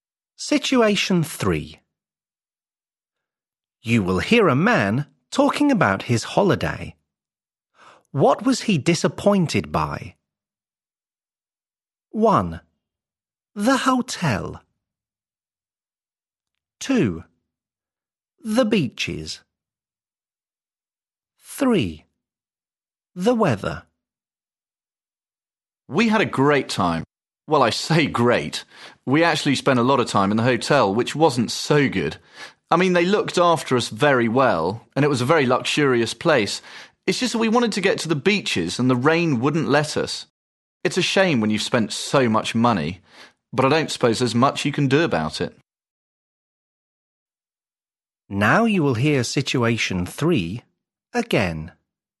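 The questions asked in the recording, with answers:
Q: What was he disappointed by?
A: 3: The weather.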